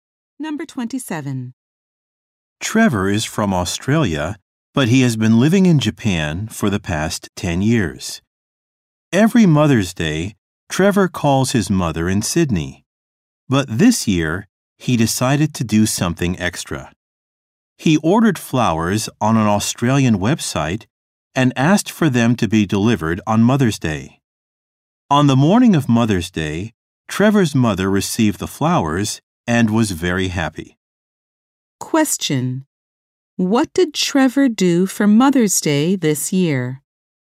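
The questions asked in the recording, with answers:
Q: Question: What did Trevor do for Mother's Day this year?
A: Ordered flowers delivered to his mother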